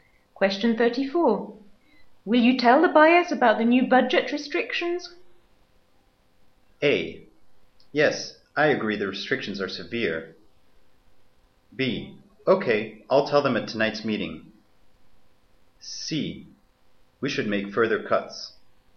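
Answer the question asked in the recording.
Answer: B: Okay, I'll tell them at tonight's meeting.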